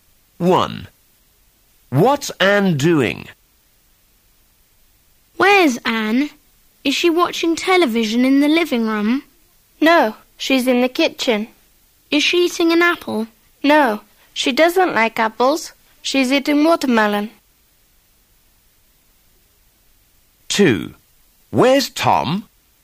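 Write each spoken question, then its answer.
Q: What's Anne doing?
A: Eating watermelon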